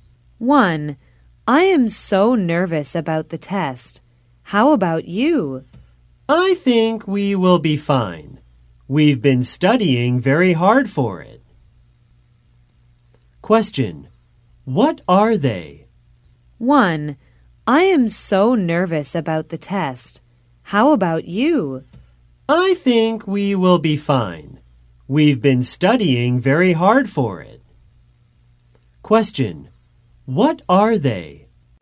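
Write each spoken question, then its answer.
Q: What are they?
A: Students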